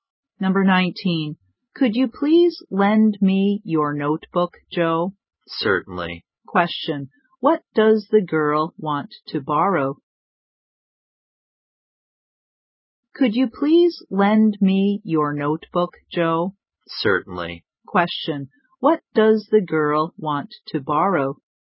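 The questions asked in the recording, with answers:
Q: What does the girl want to borrow?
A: Joe's notebook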